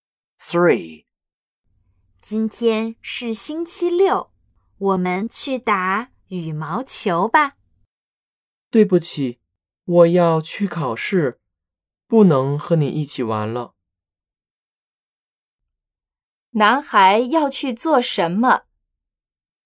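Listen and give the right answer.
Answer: 去考试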